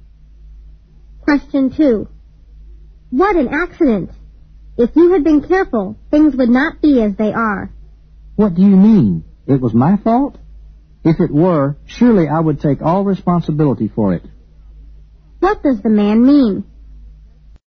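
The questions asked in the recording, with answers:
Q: What does the man mean?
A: The accident was not his fault.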